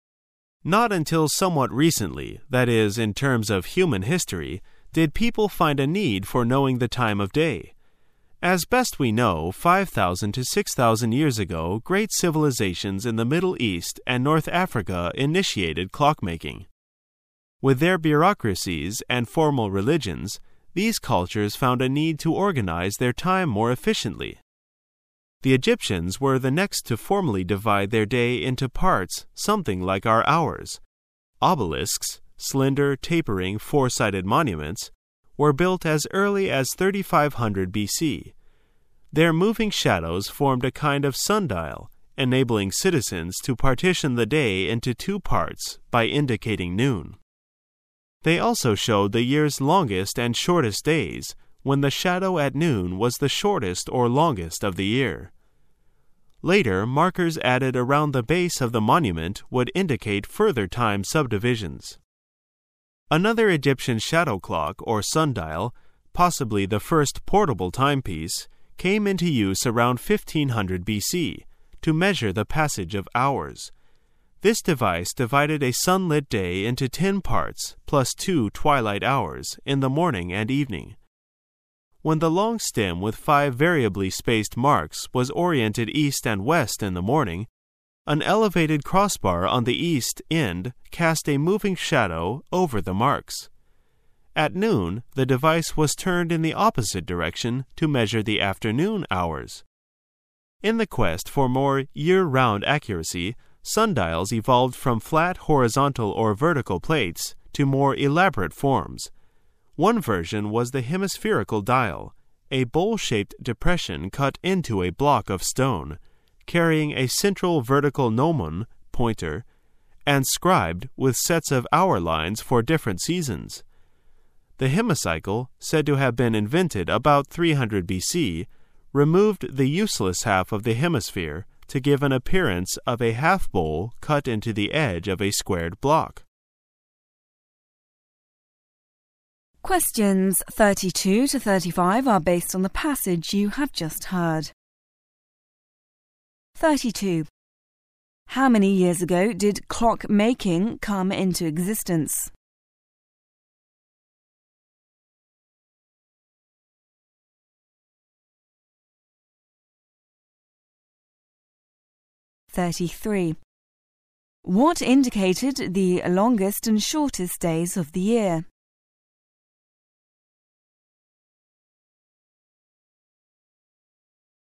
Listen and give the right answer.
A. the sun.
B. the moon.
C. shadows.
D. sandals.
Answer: C. shadows.

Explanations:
此题考查听细节的能力。此题只要紧抓关键词组"the longest and the shortest days of the year",有的考生选B是因为把moving误听为moon。选C的考生是混淆了"sandals"和"shadows"。

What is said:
[解析] 32-35 Not until somewhat recently (that is, in terms of human history) did people find a need for knowing the time of day. As best we know, 5000 to 6000 years ago great civilizations in the Middle East and North Africa initiated clock-making. With their bureaucracies and formal religions, these cultures found a need to organize their time more efficiently. The Egyptians were the next to formally divide their day into parts something like our hours. Obelisks (slender, tapering, four-sided monuments) were built as early as 3500 B. Their moving shadows formed a kind of sundial, enabling citizens to partition the day into two parts by indicating noon. They also showed the year's longest and shortest days when the shadow at noon was the shortest or longest of the year. Later, markers added around the base of the monument would indicate further time subdivisions. Another Egyptian shadow clock or sundial, possibly the first portable timepiece, came into use around 1500 B.C. to measure the passage of "hours". This device divided a sunlit day into 10 parts plus two "twilight hours" in the morning and evening. When the long stem with 5 variably spaced marks was oriented east and west in the morning, an elevated crossbar on the east end cast a moving shadow over the marks. At noon, the device was turned in the opposite direction to measure the afternoon "hours". In the quest for more year-round accuracy, sundials evolved from flat horizontal or vertical plates to more elaborate forms. One version was the hemispherical dial, a bowl shaped depression cut into a block of stone, carrying a central vertical gnomon (pointer) and scribed with sets of hour lines for different seasons. The hemicycle, said to have been invented about 300 B. , removed the useless half of the hemisphere to give an appearance of a half bowl cut into the edge of a squared block. How many years ago did clock making come into existence?